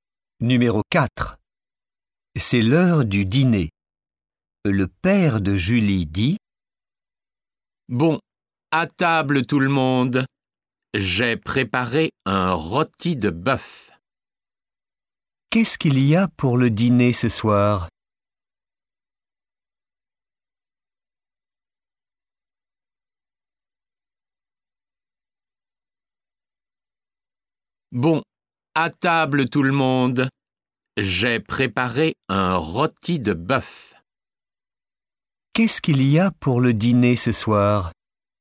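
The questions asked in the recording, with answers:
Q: Qu'est-ce qu'il y a pour le dîner ce soir ?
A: Un rôti de bœuf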